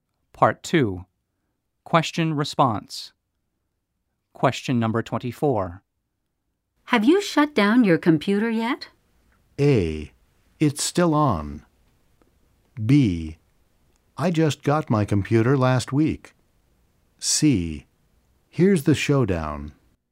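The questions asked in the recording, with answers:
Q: Have you shut down your computer yet?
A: A: It's still on.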